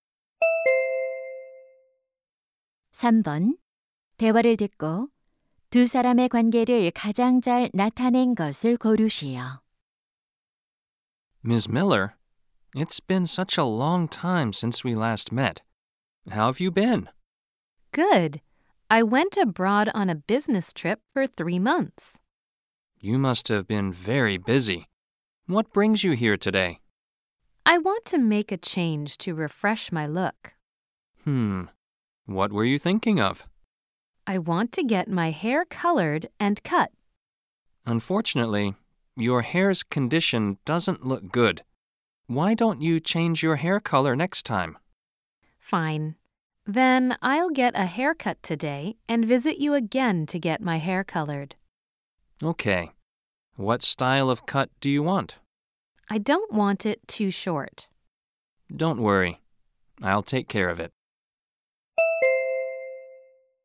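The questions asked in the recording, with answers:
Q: 두 사람의 관계를 가장 잘 나타낸 것을 고르시오.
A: 미용사 - 손님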